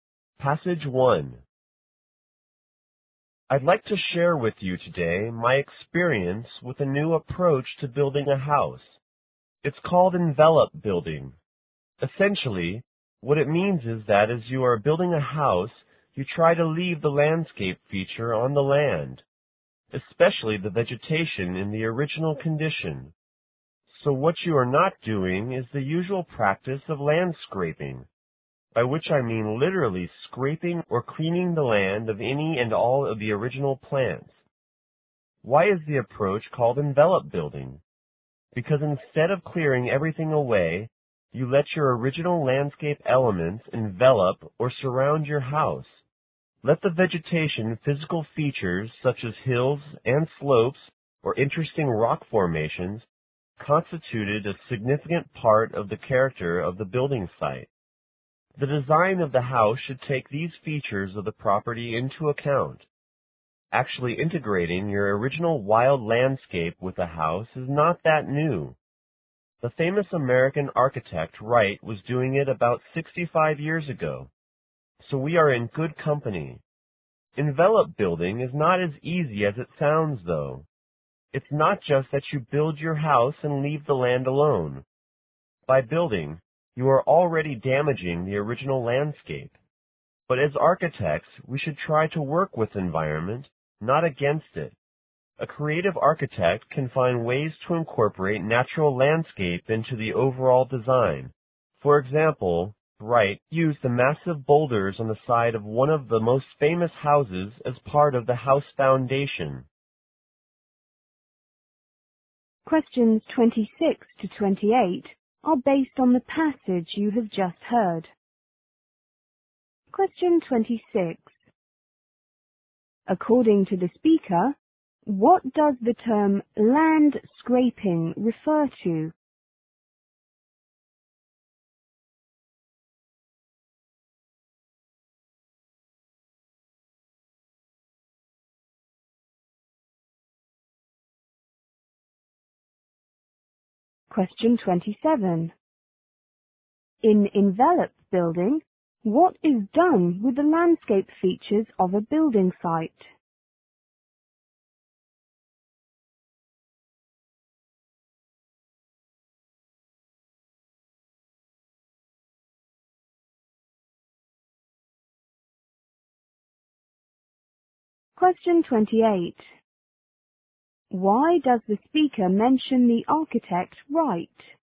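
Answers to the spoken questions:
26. Clearing the land of all its original plants
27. They are kept in their original condition, around the house.
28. To show that the idea of integrating the landscape with a house is not new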